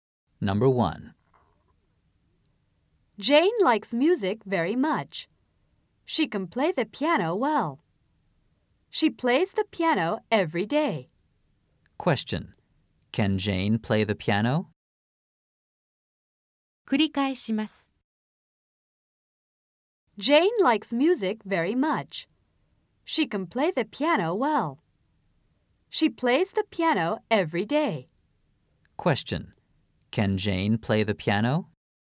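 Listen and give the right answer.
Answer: Yes, she can.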